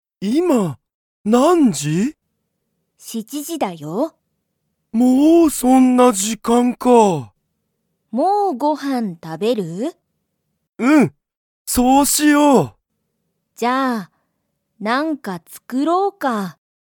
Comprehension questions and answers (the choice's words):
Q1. ユウヤとサキは、____。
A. ご飯はんを食たべる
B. 一緒いっしょに飲のむ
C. 友達ともだちと行いく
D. 二人ふたりで帰かえる)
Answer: ご飯はんを食たべる

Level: Level 1